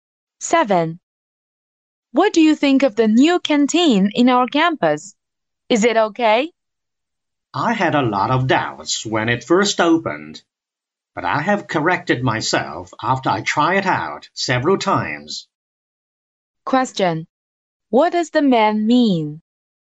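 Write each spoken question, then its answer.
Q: What does the man mean?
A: The new canteen is actually good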